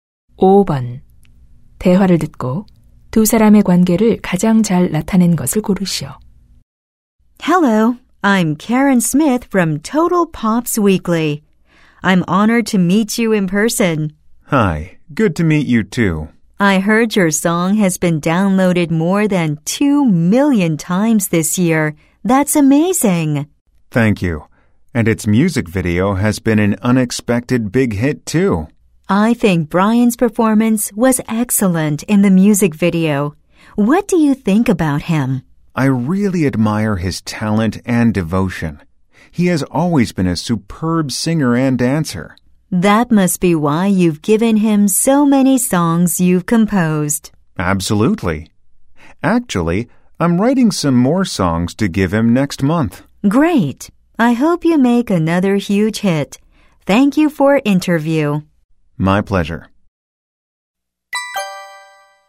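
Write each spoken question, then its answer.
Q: 대화를 듣고 두 사람의 관계를 가장 잘 나타낸 것을 고르시오.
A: 기자 - 작곡가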